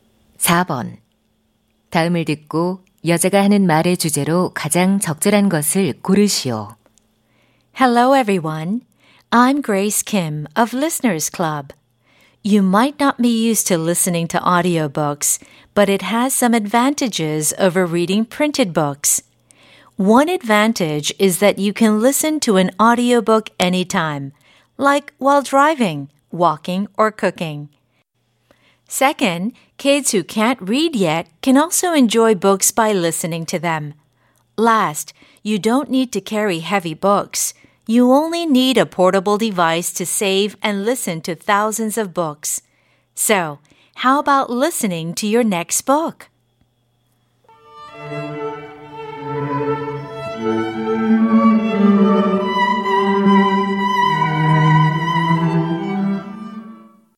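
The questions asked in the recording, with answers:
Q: 다음을 듣고 여자가 하는 말의 주제로 가장 적절한 것을 고르시오.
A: 오디오북을 듣는 것의 장점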